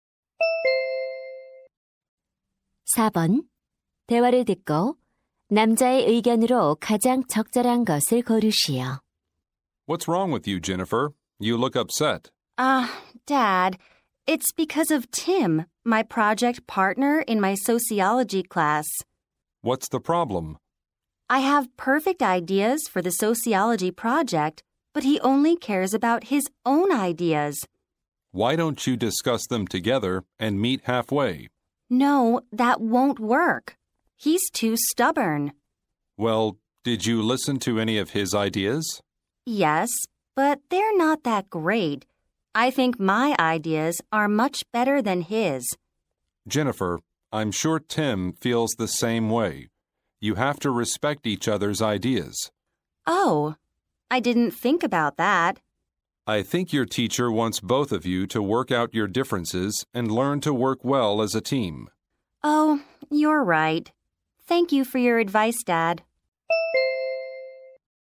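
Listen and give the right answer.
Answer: 공동 과제에서는 서로의 의견을 존중해야 한다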